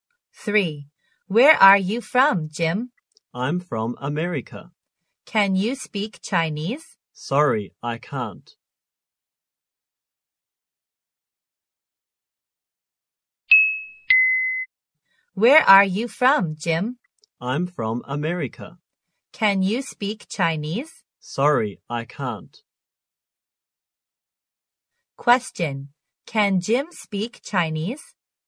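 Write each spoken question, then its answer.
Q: Can Jim speak Chinese?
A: No, he can't.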